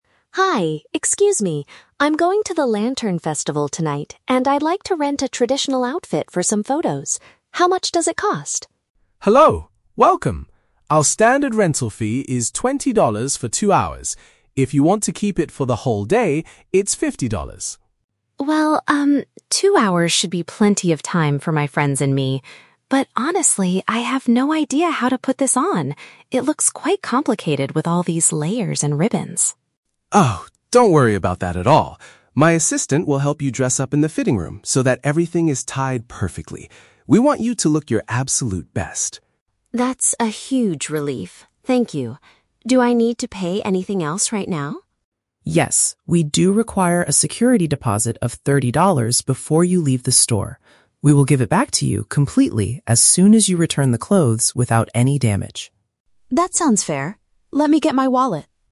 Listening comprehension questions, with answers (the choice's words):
Listen to a conversation between a tourist and a shop owner, and choose the correct answer (A, B, or C) for each question.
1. How long does the tourist plan to keep the traditional clothes?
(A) For the entire day.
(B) For a couple of hours.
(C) Until the festival ends tonight.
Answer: For a couple of hours.

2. How will the tourist manage to wear the complex outfit?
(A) She will follow a set of printed instructions.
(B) She already knows how to tie the ribbons correctly.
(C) A staff member will assist her in getting dressed.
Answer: A staff member will assist her in getting dressed.

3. What is the shop's policy regarding the security deposit?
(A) It is fully refunded when the items are brought back safely.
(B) It costs exactly thirty dollars to repair any damaged clothing.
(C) It is an extra fee used to clean the outfits after they are worn.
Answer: It is fully refunded when the items are brought back safely.

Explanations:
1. Mia says that "two hours should be plenty of time." Option (B) uses a synonym ("a couple of hours" = two hours). Option (A) is a trap; the owner mentions the price for the "whole day" (entire day), but Mia does not choose it. Option (C) is a plausible guess because she mentions the festival, but it is not the rental duration she agreed to.
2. The shop owner says, "My assistant will help you dress up in the fitting room." Option (C) perfectly paraphrases this ("staff member" = assistant, "getting dressed" = dress up). Option (B) is a trap; "tie the ribbons" is mentioned, but Mia explicitly says she has "no idea" how to do it. Option (A) is never mentioned in the audio.
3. The owner states that they will "give it back to you completely as soon as you return the clothes without any damage." Option (A) uses paraphrasing ("fully refunded" = give it back completely, "brought back safely" = return without damage). Option (B) is a trap; thirty dollars is the deposit amount, not the price of repairing damage. Option (C) sounds like a logical rule for a rental shop, but cleaning fees are never discussed.

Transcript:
Mia: Hi, excuse me. I'm going to the lantern festival tonight and I'd like to rent a traditional outfit for some photos. How much does it cost?
Shop Owner: Hello! Welcome. Our standard rental fee is twenty dollars for two hours. If you want to keep it for the whole day, it's fifty dollars.
Mia: Well, um, two hours should be plenty of time for my friends and me. But honestly, I have no idea how to put this on. It looks quite complicated with all these layers and ribbons.
Shop Owner: Oh, don't worry about that at all. My assistant will help you dress up in the fitting room so that everything is tied perfectly. We want you to look your absolute best!
Mia: That's a huge relief, thank you. Do I need to pay anything else right now?
Shop Owner: Yes, we do require a security deposit of thirty dollars before you leave the store. We will give it back to you completely as soon as you return the clothes without any damage.